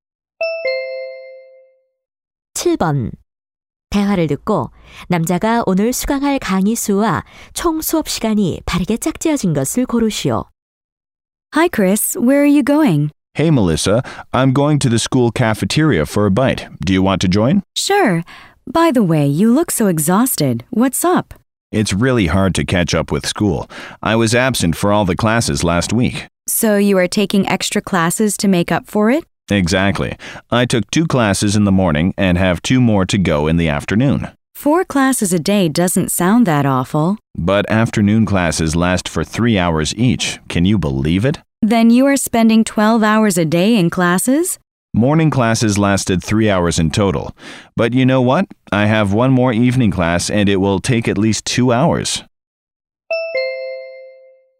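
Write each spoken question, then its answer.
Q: 대화를 듣고 남자가 오늘 수강할 강의 수와 총 수업 시간이 바르게 짝지어진 것을 고르시오.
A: 강의 5개, 총 11시간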